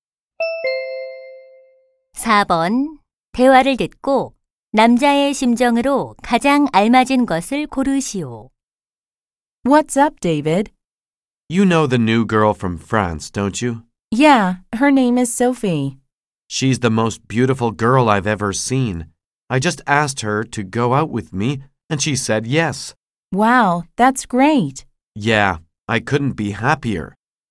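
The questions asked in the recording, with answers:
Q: 대화를 듣고 남자의 심정으로 가장 알맞은 것을 고르시오.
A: 행복함(기쁨)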